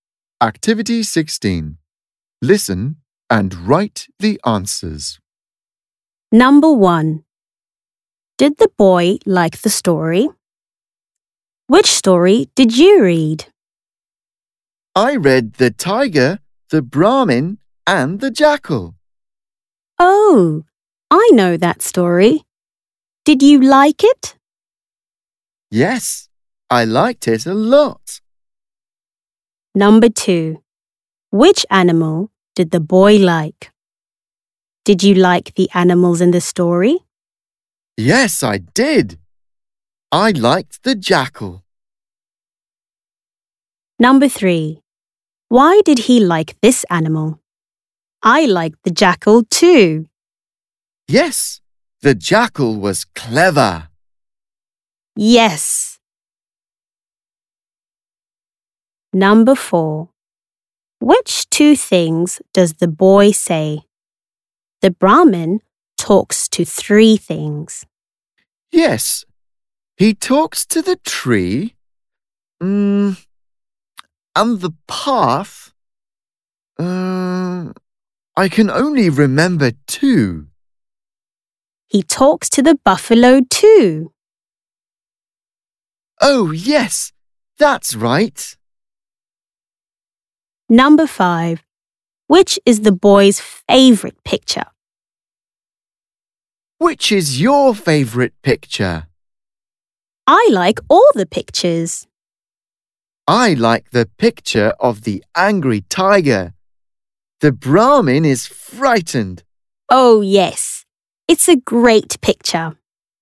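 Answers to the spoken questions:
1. Yes, a lot
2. The jackal
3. The jackal was clever
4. The tree and the path
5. The picture of the angry tiger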